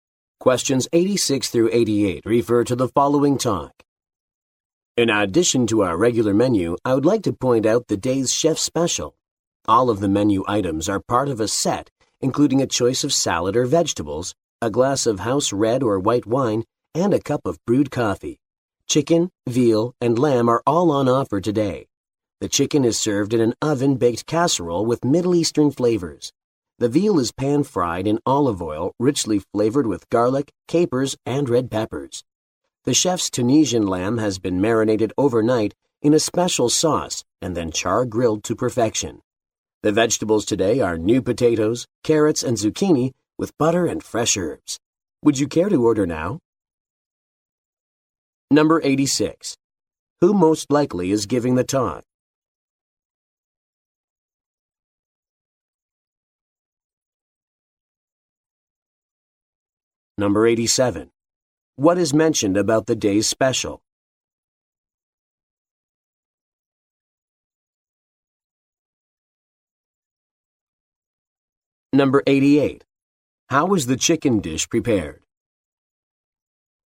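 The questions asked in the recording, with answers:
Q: Who most likely is giving the talk?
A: A waiter

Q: What is mentioned about the day's special?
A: It is a set including salad or vegetables, wine, and coffee

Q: How is the chicken dish prepared?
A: Oven-baked in a casserole with Middle Eastern flavors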